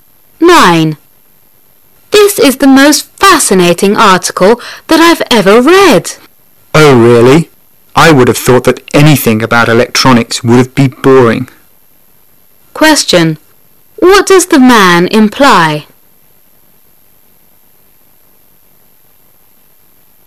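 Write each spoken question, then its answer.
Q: What does the man imply?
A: He is surprised she finds an article about electronics interesting.

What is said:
[解析] Woman: This is the most fascinating article that I've ever read. Man: Oh, really? I would have thought that anything about electronics would be boring. Question: What does the man imply?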